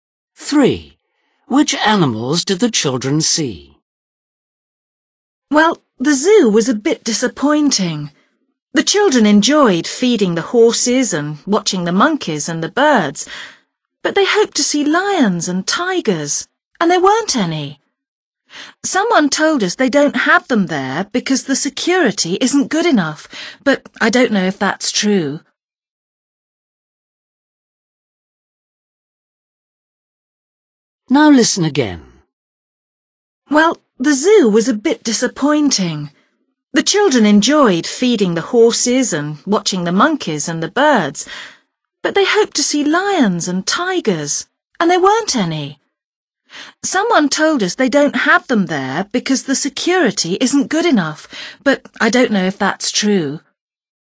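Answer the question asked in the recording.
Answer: horses, monkeys and birds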